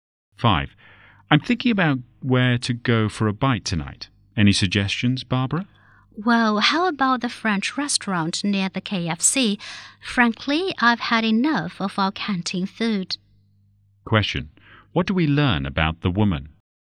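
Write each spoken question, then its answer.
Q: What do we learn about the woman?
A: She is tired of the canteen food and suggests the French restaurant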